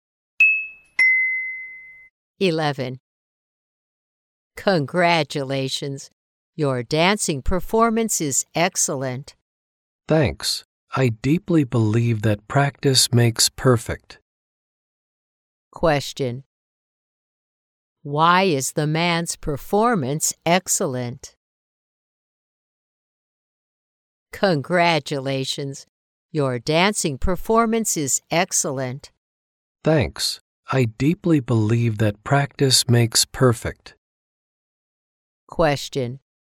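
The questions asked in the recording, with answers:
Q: Why is the man's performance excellent?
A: Because he practices a lot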